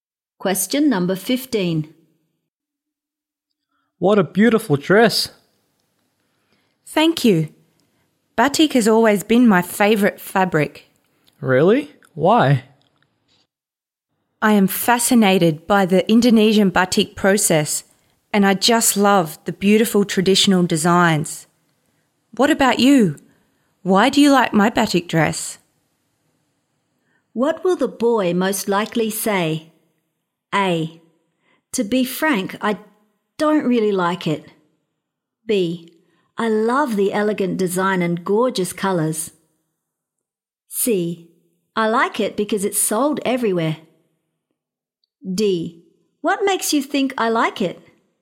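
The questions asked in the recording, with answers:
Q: What will the boy most likely say?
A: B: I love the elegant design and gorgeous colours.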